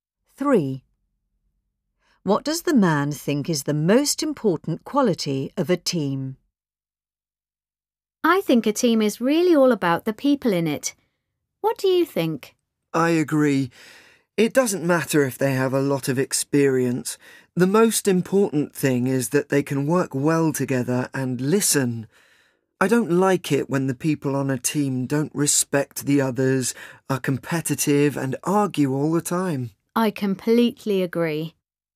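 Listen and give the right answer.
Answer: That they can work well together and listen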